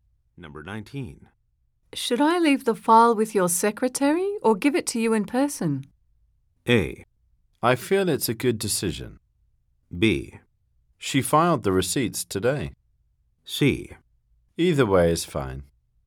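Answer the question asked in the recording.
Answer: C: Either way is fine.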